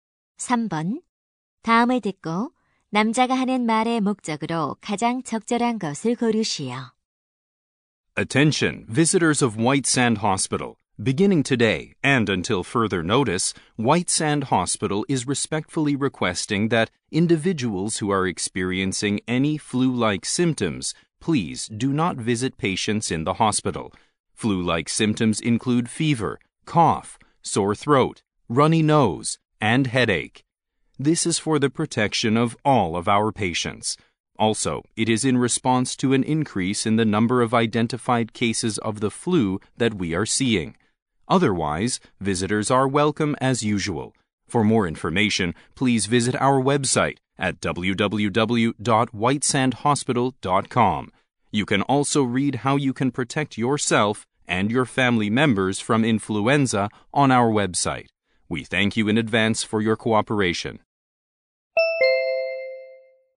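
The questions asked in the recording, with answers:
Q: 다음을 듣고 남자가 하는 말의 목적으로 가장 적절한 것을 고르시오.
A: 독감 증상이 있는 사람은 환자 병문안을 자제해 달라고 요청하려고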